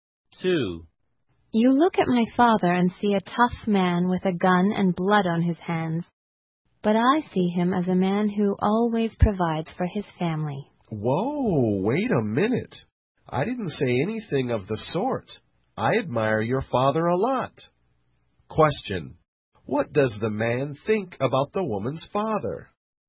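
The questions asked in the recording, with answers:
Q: What does the man think about the woman's father?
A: He admires him a lot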